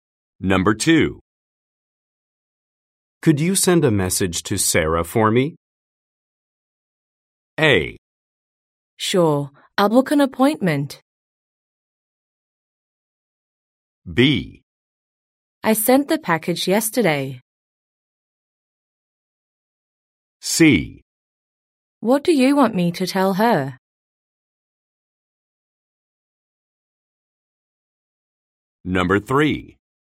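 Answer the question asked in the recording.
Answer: C: What do you want me to tell her?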